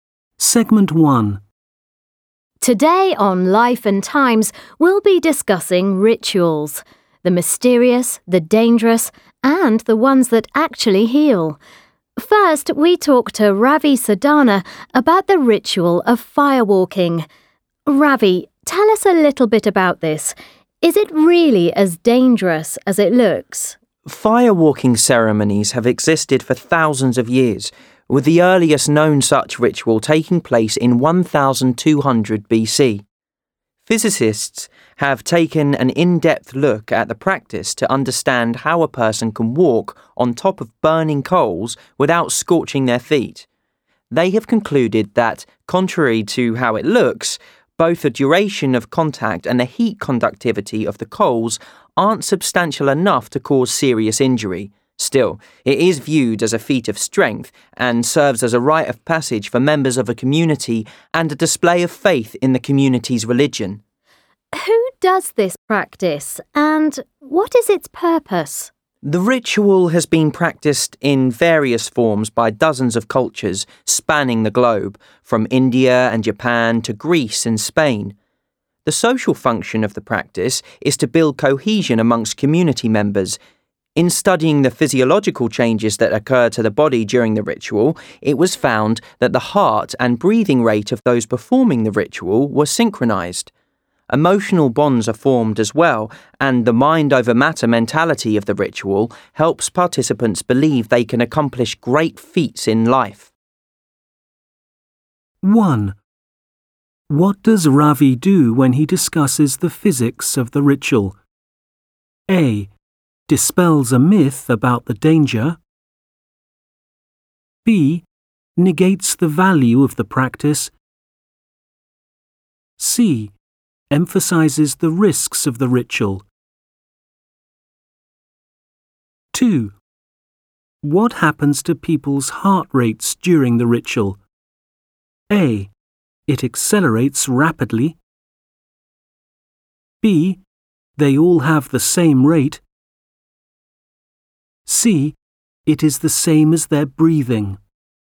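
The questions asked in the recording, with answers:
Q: What does Ravi do when he discusses the physics of the ritual?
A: A: Dispels a myth about the danger.

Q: What happens to people's heart rates during the ritual?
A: B: They all have the same rate.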